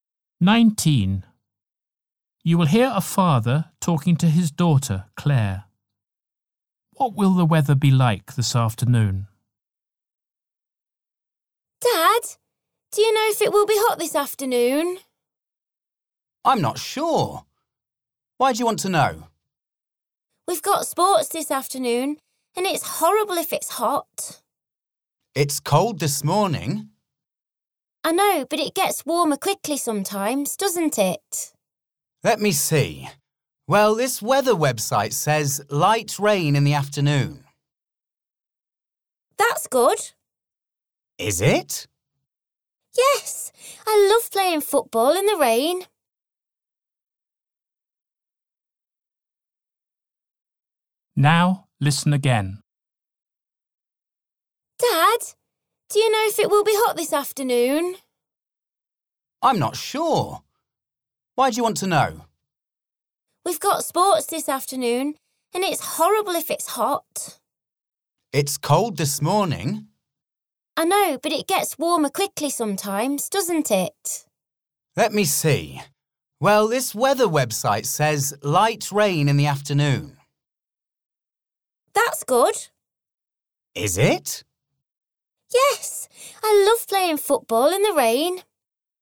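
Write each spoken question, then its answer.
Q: What will the weather be like this afternoon?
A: Light rain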